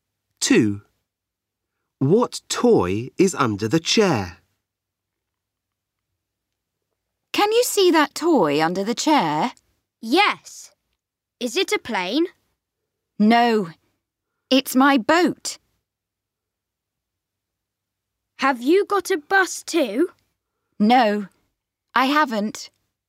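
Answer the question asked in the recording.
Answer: A boat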